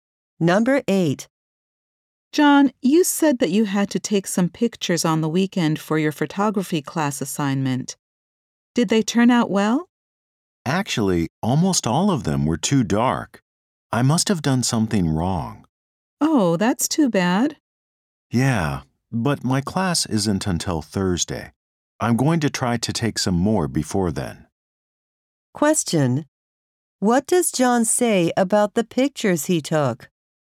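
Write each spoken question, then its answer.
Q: What does John say about the pictures he took?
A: Almost all of them were too dark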